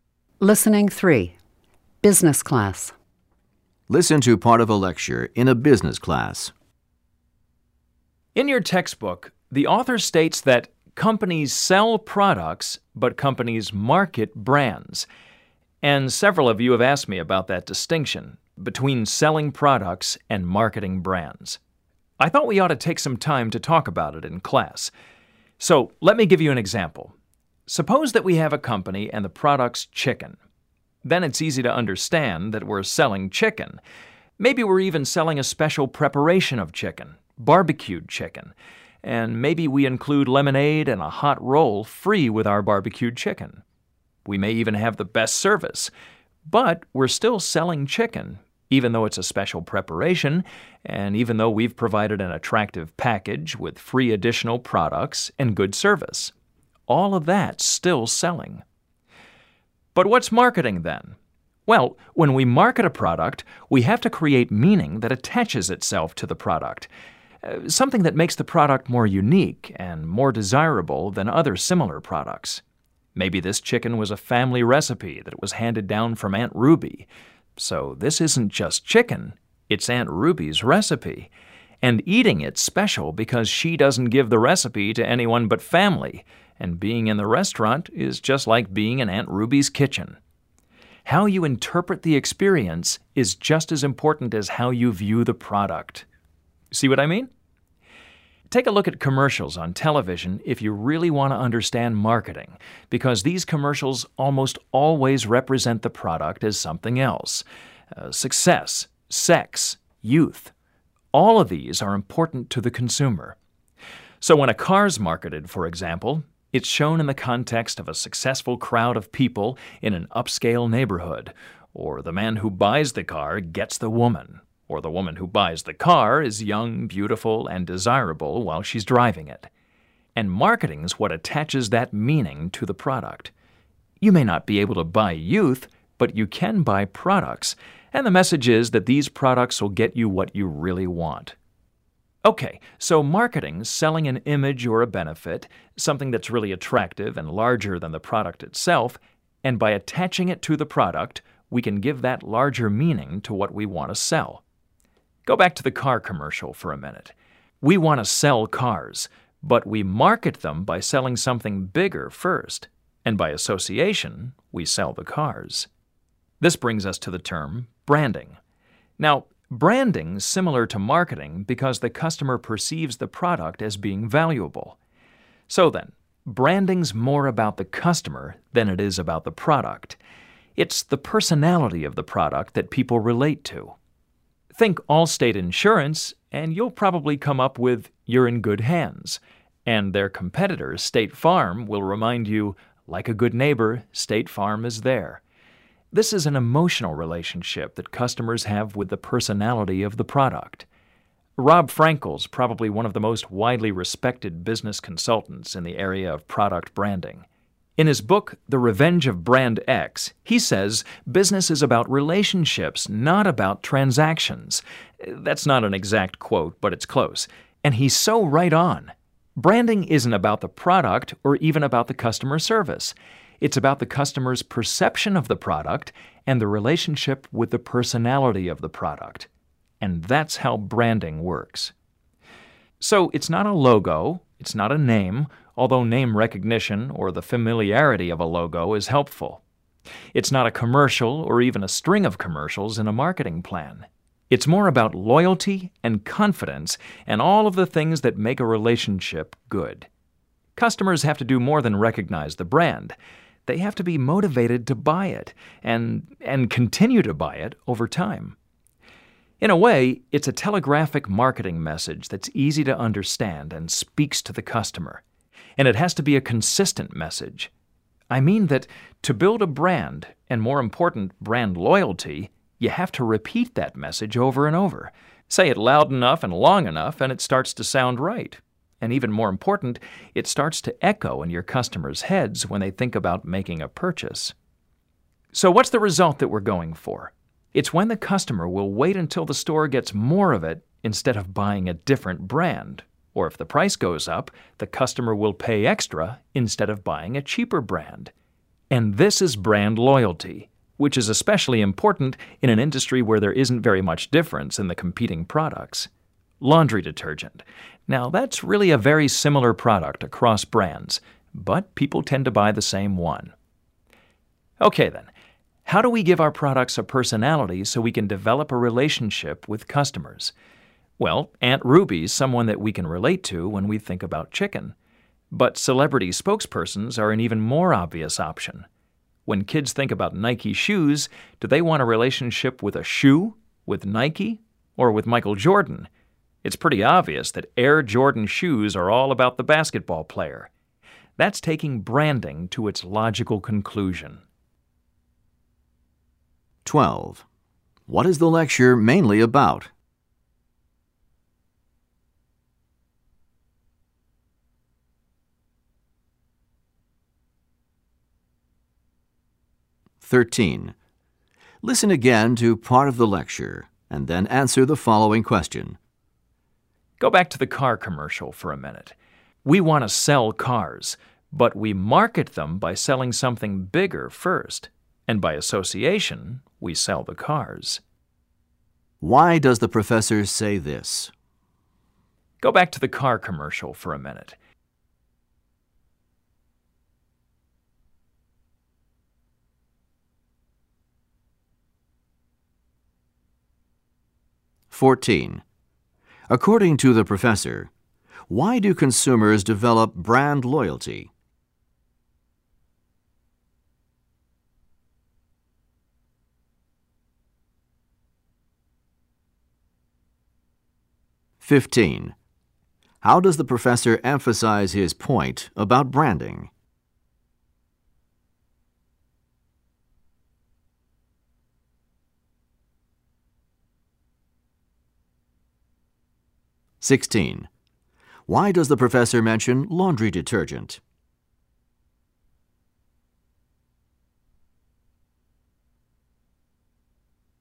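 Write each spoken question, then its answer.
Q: What is the lecture mainly about?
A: The difference between selling products and marketing brands

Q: Why does the professor mention laundry detergent?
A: As an example of very similar products where brand loyalty matters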